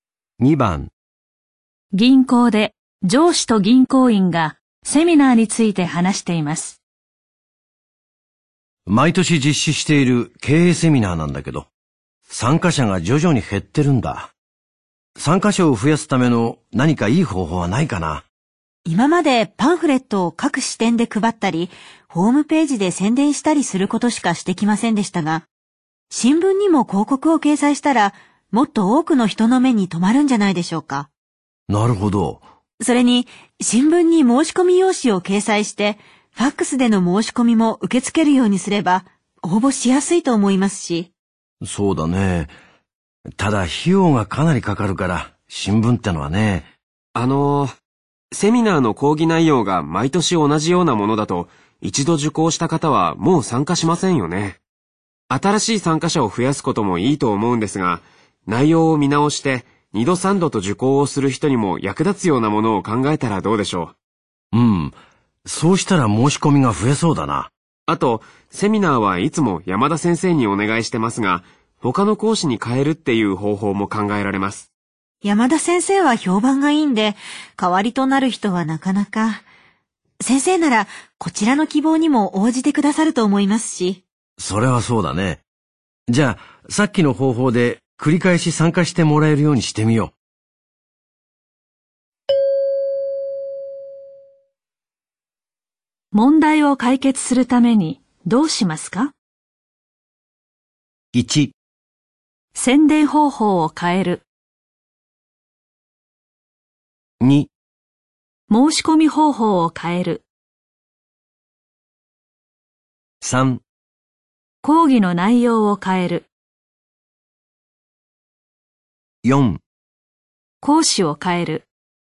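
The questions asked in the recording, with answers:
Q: 問題を解決するためにどうしますか?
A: 3: 講義の内容を変える。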